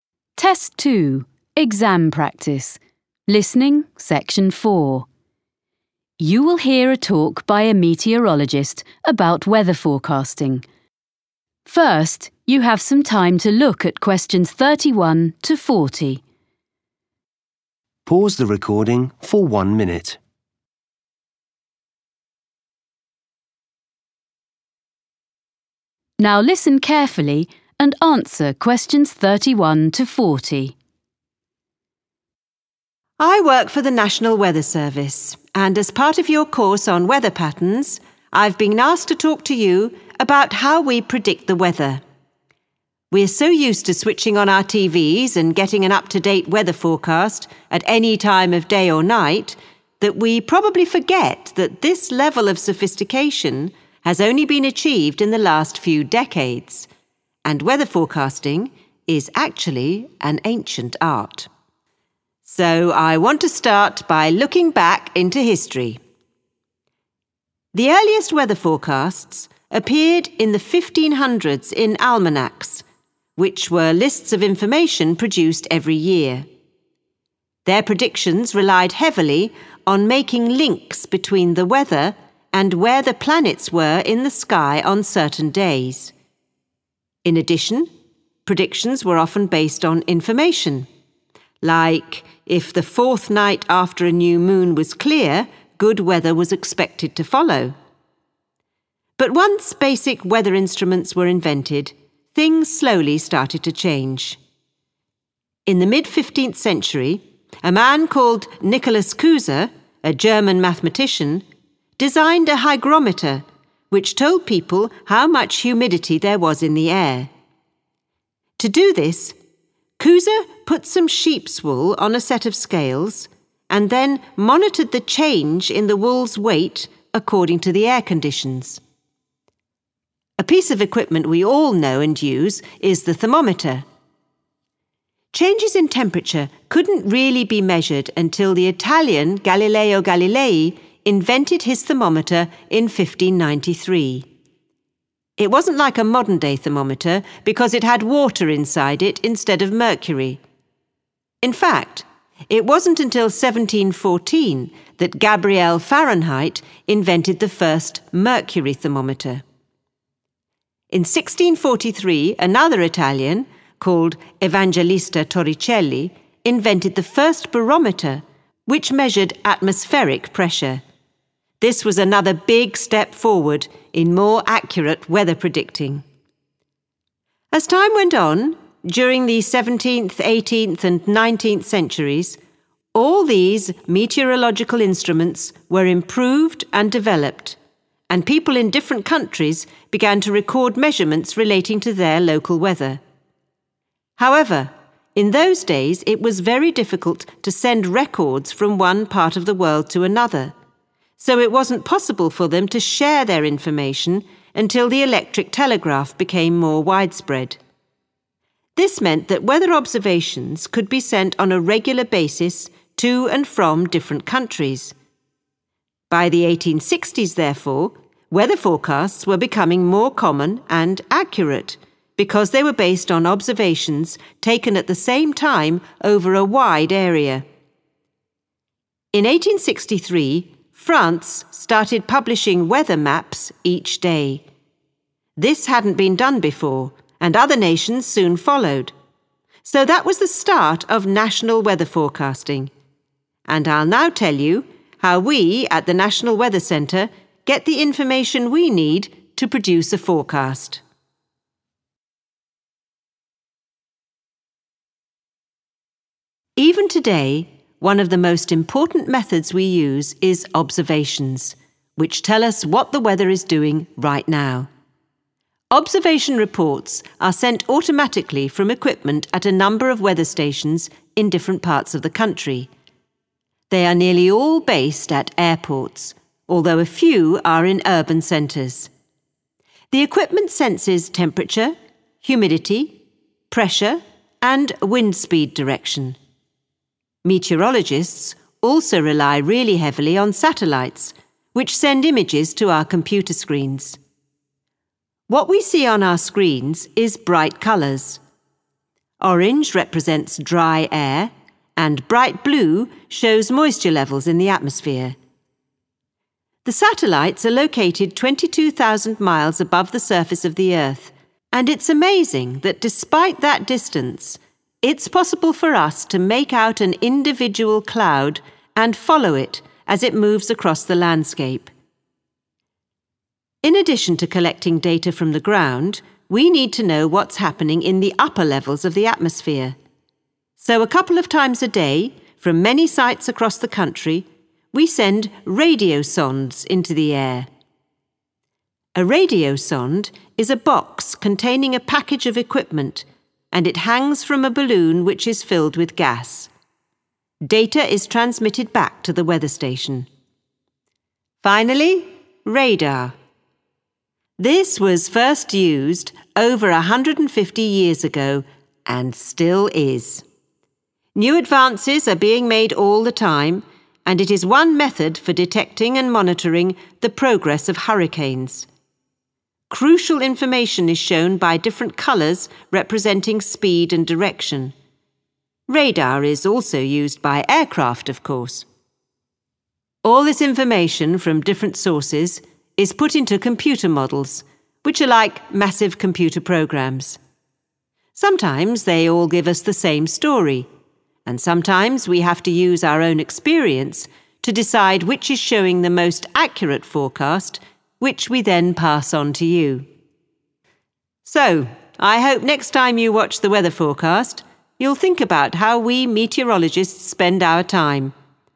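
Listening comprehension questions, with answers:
Questions 31-35. Complete the notes below. Write NO MORE THAN TWO WORDS for each answer.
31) Almanacs connected the weather with the positions of different 31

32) A hygrometer showed levels of 32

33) Temperature variations first measured by a thermometer containing 33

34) The use of the 34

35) Daily 35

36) Weather observation stations are found mostly at 36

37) Satellite images use the colour orange to show 37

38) The satellites give so much detail that meteorologists can distinguish a particular 38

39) Information about the upper atmosphere is sent from instruments attached to a 39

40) Radar is particularly useful for following the movement of 40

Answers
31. planets
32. humidity
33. water
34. electric telegraph
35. weather maps
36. airports
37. dry air
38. cloud
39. balloon
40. hurricanes

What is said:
I work for the National Weather Service and as part of your course on weather patterns, I've been asked to talk to you about how we predict the weather. 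We're so used to switching on our TVs and getting an up-to-date weather forecast at any time of day or night that we probably forget that this level of sophistication has only been achieved in the last few decades and weather forecasting is actually an ancient art. So I want to start by looking back into history.
The earliest weather forecasts appeared in the 1500s in almanacs, which were lists of information produced every year. (Q31) Their predictions relied heavily on making links between the weather and where (= connected the weather with the positions of) the planets were in the sky on certain days.
But once basic weather instruments were invented, things slowly started to change. (Q32) In the mid-fifteenth century, a man called Nicholas Cusa, a German mathematician, designed a hygrometer which told people how much (= a hygrometer showed) humidity there was in the air.
A piece of equipment we all know and use is the thermometer. 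(Q33) Changes in temperature couldn't really be measured until the Italian Galileo Galilei invented his thermometer in 1593. It wasn't like a modern-day thermometer because it had water inside it instead of mercury. In 1643 another Italian called Evangelista Torricelli invented the first barometer which measured atmospheric pressure. This was another big step forward in more accurate weather predicting.
As time went on, during the seventeenth, eighteenth and nineteenth centuries, all these meteorological instruments were improved and developed and people in different countries began to record measurements relating to their local weather. However, (Q34) in those days it was very difficult to send records from one part of the world to another so it wasn't possible for them to share their information (= allowed information to be passed) until the electric telegraph became more widespread. By the 1860s, therefore, weather forecasts were becoming more common and accurate because they were based on observations taken at the same time over a wide area. 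(Q35) In 1863, France started publishing weather maps each day (= daily). So that was the start of national weather forecasting and I'll now tell you how we at the National Weather Centre get the information we need to produce a forecast.
Questions
Questions 36-40.
Producing a weather forecast
airports
country.
dry air
cloud
39. Information about the upper atmosphere is sent from instruments
balloon
hurricanes
Even today, one of the most important methods we use is observations which tell us what the weather is doing right now. Observation reports are sent automatically from equipment at a number of weather stations in different parts of the country. (Q36) They are nearly all (= mostly) based at airports although a few are in urban centres.
Meteorologists also rely really heavily on satellites which send images to our computer screens. What we see on our screens is bright colours. (Q37) Orange represents dry air and bright blue shows moisture levels in the atmosphere.
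In addition to collecting data from the ground, we need to know what's happening in the upper levels of the atmosphere. So a couple of times a day from many sites across the country, we send radiosondes into the air. (Q39) A radiosonde is a box containing a package of equipment (= instruments) and it hangs from a balloon which is filled with gas.
(Q40) Finally, radar. This was first used over 150 years ago and still is. New advances are being made all the time and it is one method for detecting and monitoring the progress (= following the movement) of hurricanes. Radar is also used by aircraft, of course.
All this information from different sources is put into computer models which are like massive computer programs. Sometimes they all give us the same story and sometimes we have to use our own experience to decide which is showing the most accurate forecast which we then pass on to you.
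So I hope next time you watch the weather forecast, you'll think about how we meteorologists spend our time. And maybe I've persuaded some of you to study meteorology in more depth.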